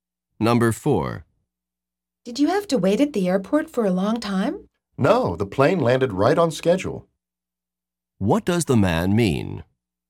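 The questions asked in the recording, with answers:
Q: What does the man mean?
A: The plane arrived on time, so he didn't wait long.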